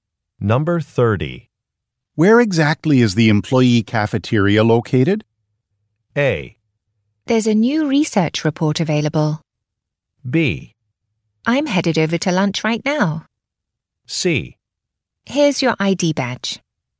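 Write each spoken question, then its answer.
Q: Where exactly is the employee cafeteria located?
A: B: I'm headed over to lunch right now.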